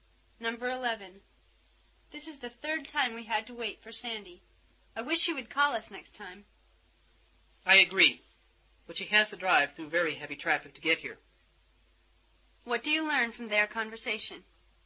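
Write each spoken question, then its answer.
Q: What do you learn from their conversation?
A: Sandy is often late because of heavy traffic.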